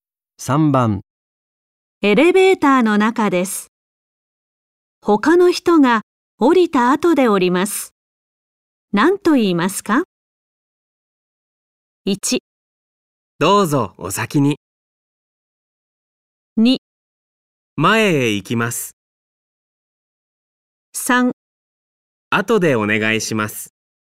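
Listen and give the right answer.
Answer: 1: どうぞお先に。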